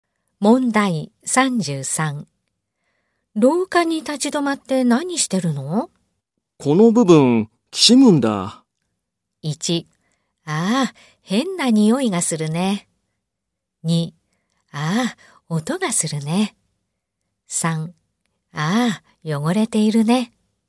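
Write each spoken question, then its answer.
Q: 廊下に立ち止まって何してるの?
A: 2: ああ、音がするね。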